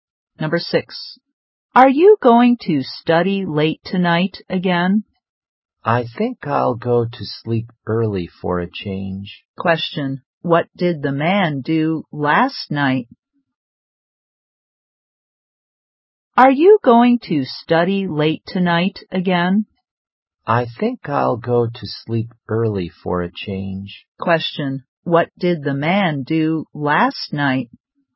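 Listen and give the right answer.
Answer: He studied late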